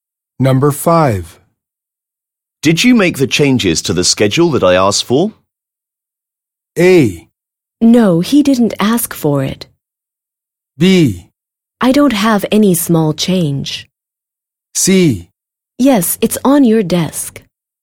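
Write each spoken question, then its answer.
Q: Did you make the changes to the schedule that I asked for?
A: C: Yes, it's on your desk.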